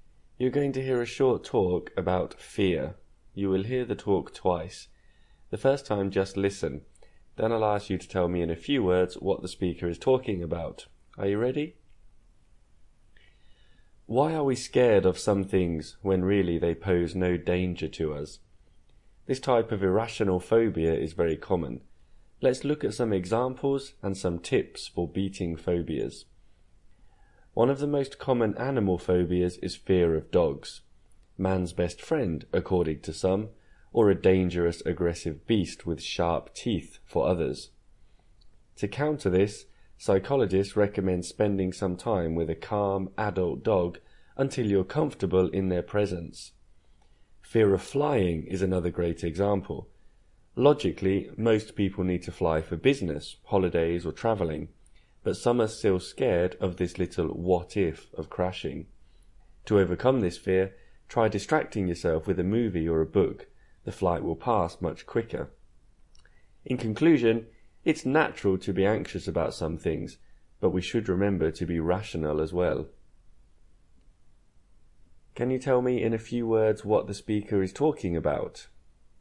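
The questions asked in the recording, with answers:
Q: Can you tell me in a few words what the speaker is talking about?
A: Irrational phobias (fear of dogs and flying) and tips for beating them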